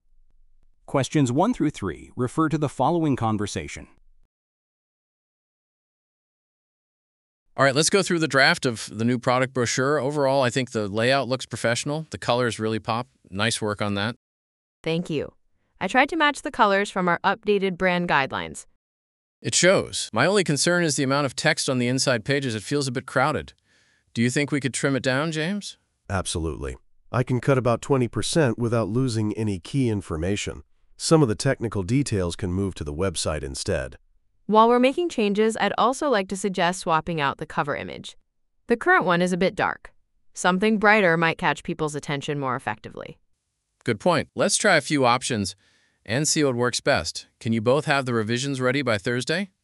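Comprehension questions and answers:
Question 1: What are the speakers reviewing?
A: A product brochure

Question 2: What does Man A want to change?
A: The amount of text

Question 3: What does the woman suggest?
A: Using a different cover image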